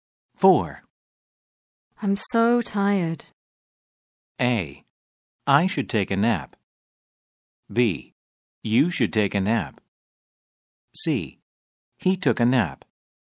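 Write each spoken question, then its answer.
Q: I'm so tired.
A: B: You should take a nap.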